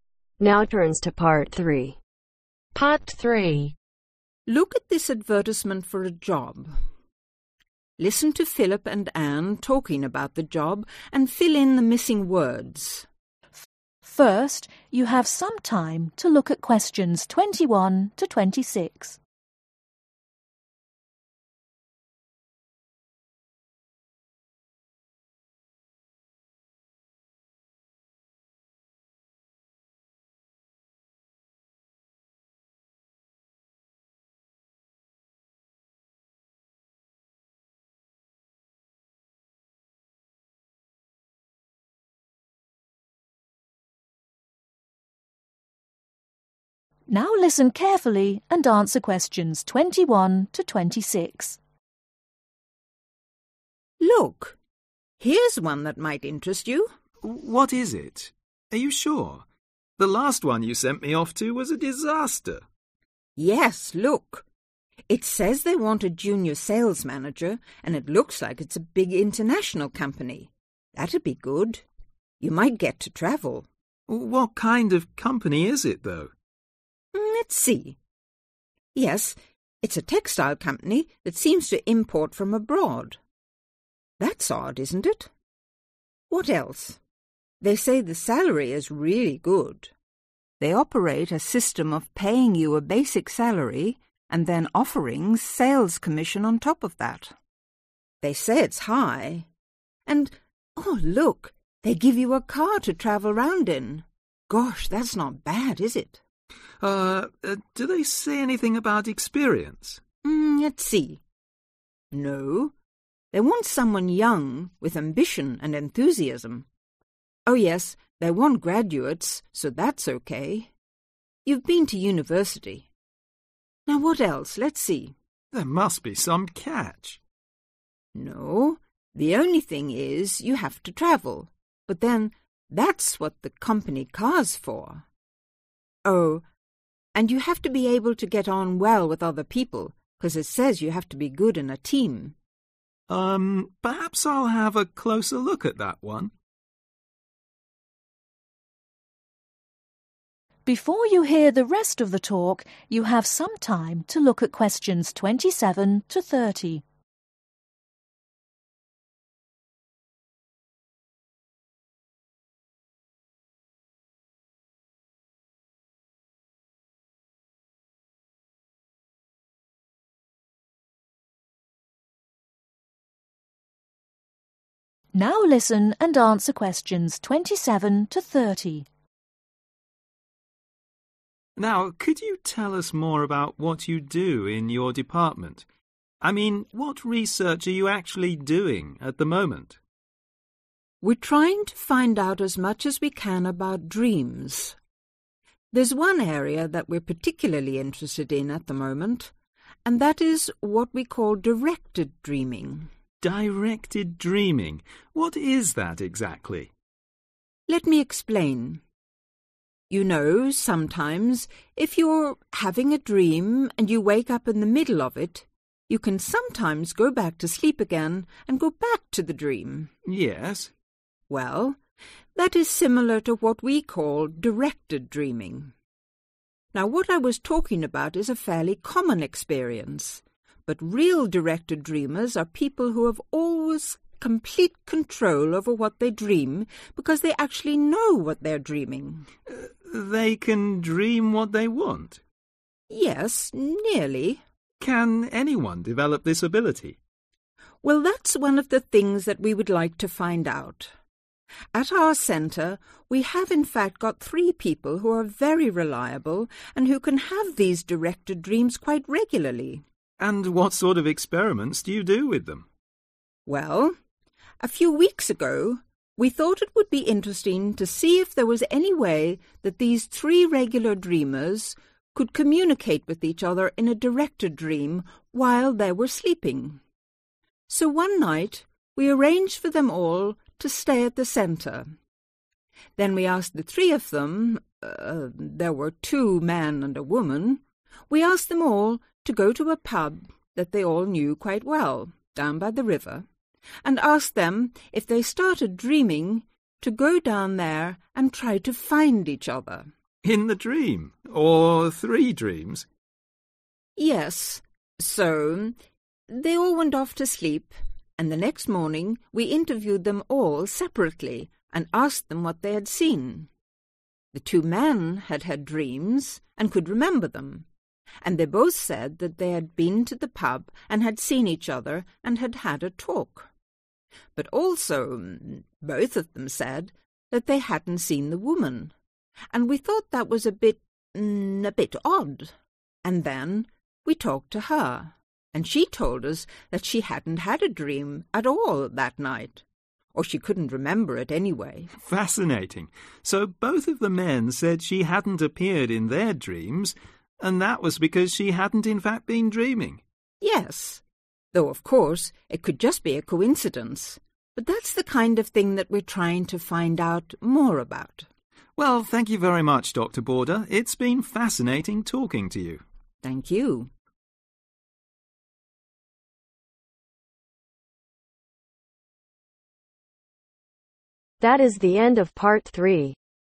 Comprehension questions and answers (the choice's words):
Complete the information below. Write ONE WORD ONLY for each answer.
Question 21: An international (21)............ . Import firm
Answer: Textile

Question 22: opportunities to increase income through high sales (22)............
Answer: Commission

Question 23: A company (23)............ is provided.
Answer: Car

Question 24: Excellent prospects for ambitious young (24)............ who have drive and enthusiasm.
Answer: Graduates

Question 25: The applicant must be prepared to (25)............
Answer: Travel

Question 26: must be able to work well in a (26)............. .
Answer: Team

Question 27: Directed dreamers are people who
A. wake up in the middle of a dream.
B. can go back to sleep after dreaming.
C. can control what they are dreaming.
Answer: can control what they are dreaming.

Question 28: Dr. border is trying to find out if people can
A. the same dream regularly.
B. talk in their sleep.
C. meet each other in their dreams.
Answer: meet each other in their dreams.

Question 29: What did the experiment require the people to do ?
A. To go to a river.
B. To sleep in the same room.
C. To dream about a particular situation.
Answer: To dream about a particular situation.

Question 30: What did the interviewer find interesting about the experiment ?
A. Neither of the men dream about woman.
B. The woman only dreamt about one of the men.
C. Both the men had an odd dream.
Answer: Neither of the men dream about woman.